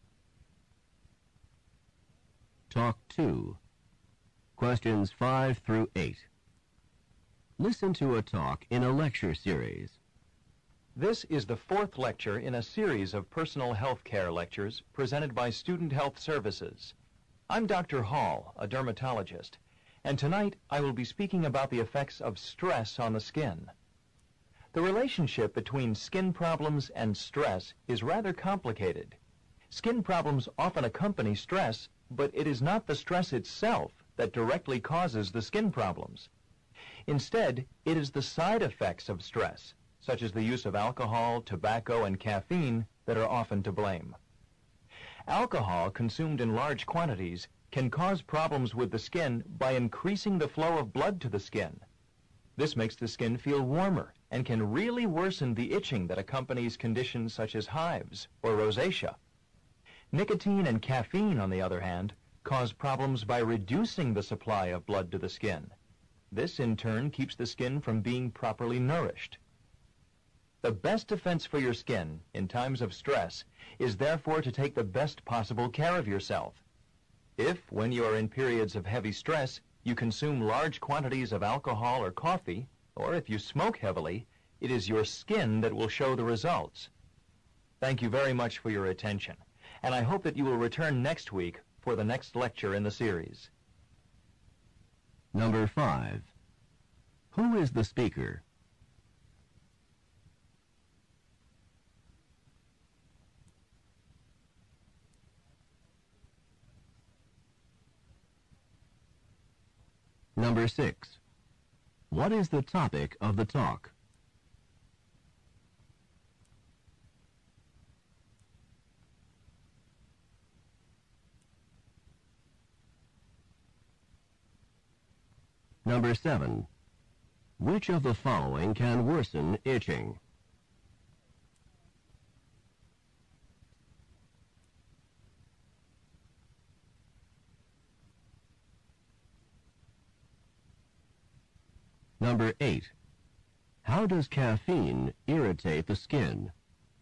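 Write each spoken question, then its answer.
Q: Who is the speaker?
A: Dr. Hall, a dermatologist

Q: What is the topic of the talk?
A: The effects of stress on the skin

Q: Which of the following can worsen itching?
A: Alcohol

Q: How does caffeine irritate the skin?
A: It reduces the blood supply to the skin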